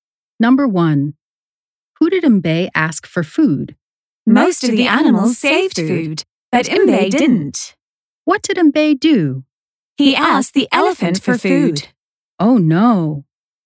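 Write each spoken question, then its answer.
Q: Who did Mbe ask for food?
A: the elephant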